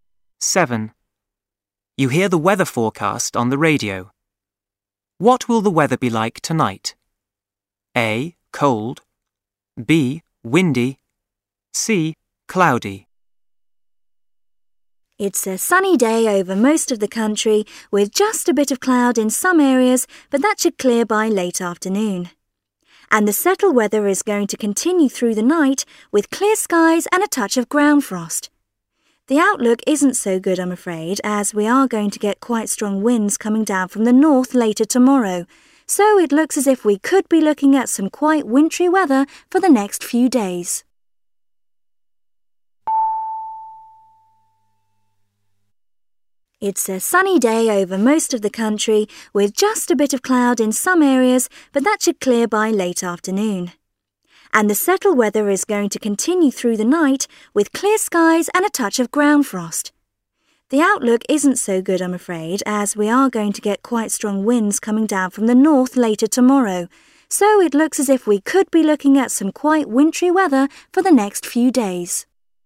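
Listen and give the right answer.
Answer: A: Cold.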